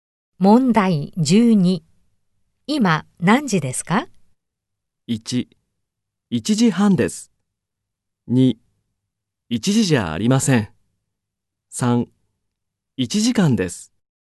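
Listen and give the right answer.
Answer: 1: 1時半です。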